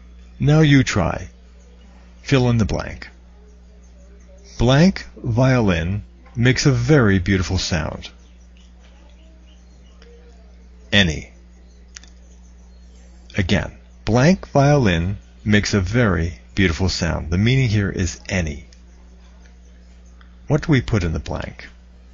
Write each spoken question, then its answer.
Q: Blank violin makes a very beautiful sound.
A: A violin makes a very beautiful sound.